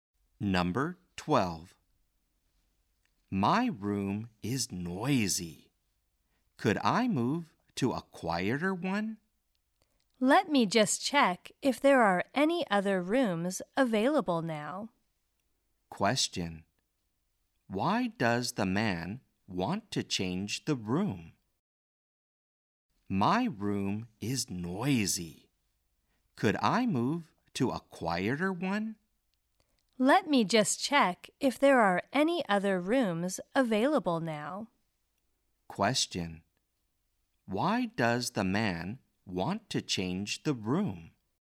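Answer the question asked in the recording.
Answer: His room is noisy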